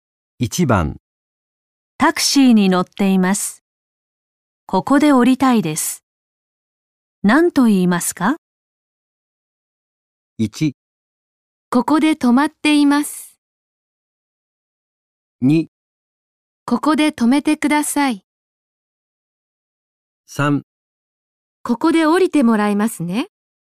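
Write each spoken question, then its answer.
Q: タクシーに乗っています。ここで降りたいです。何と言いますか?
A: 2: ここで止めてください。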